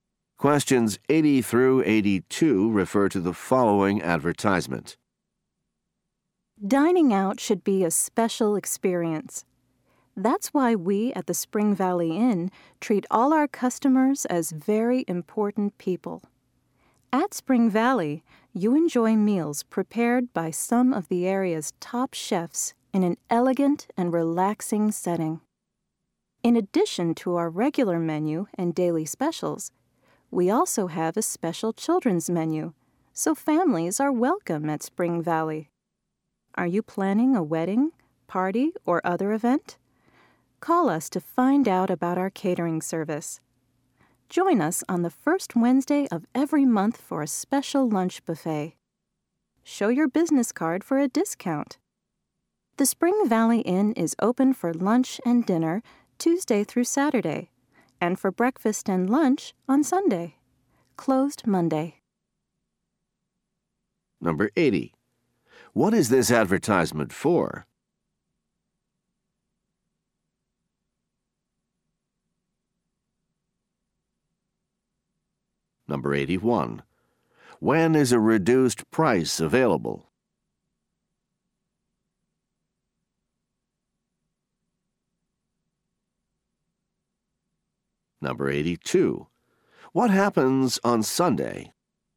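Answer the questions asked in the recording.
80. A restaurant
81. At the lunch buffet on the first Wednesday of the month
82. Breakfast and lunch are served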